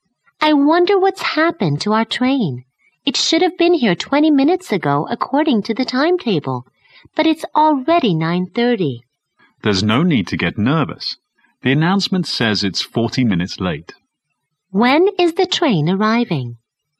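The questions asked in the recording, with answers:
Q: When is the train arriving?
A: At 9:50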